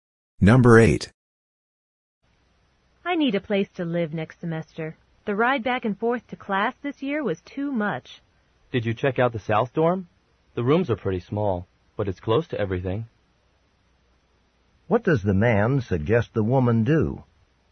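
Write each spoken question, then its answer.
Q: What does the man suggest the woman do?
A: Consider living in the South Dorm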